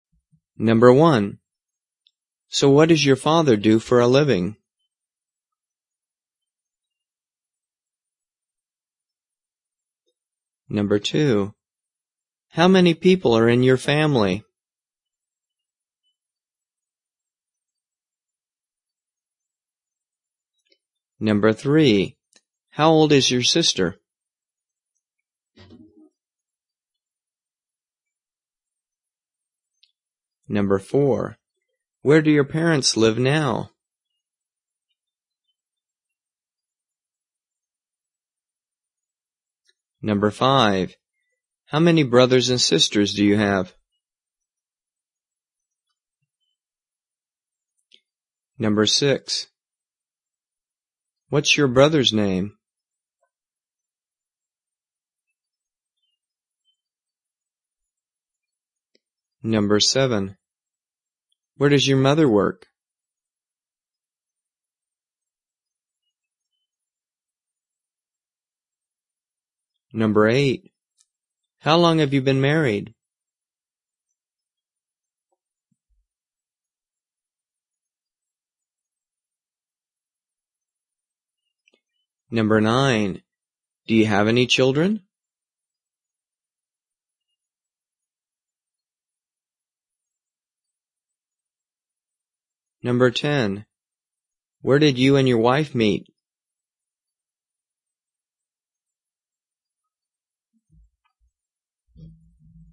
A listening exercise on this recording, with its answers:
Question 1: So, what does your father do for a living?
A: He's an architect.

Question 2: How many _____________ are in your family?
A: There are five people in my family.

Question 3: How _______ is your ________________?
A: She turned 10 in May.

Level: 初级